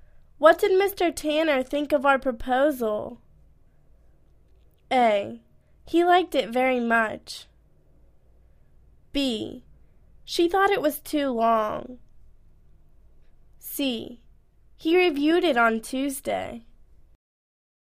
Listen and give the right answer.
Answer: He liked it very much.